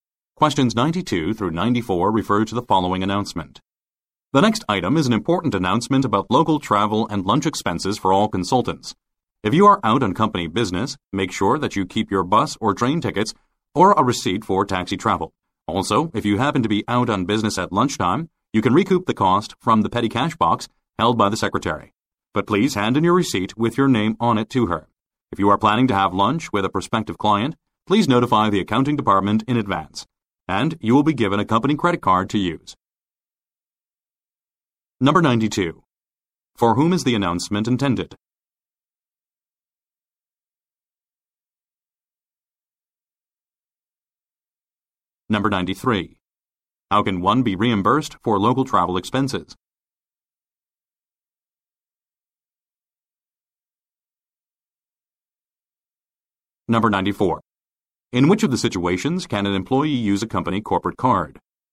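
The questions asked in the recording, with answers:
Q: For whom is the announcement intended?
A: Consultants

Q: How can one be reimbursed for local travel expenses?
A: By keeping tickets or receipts

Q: In which of the situations can an employee use a company corporate card?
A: Having lunch with a prospective client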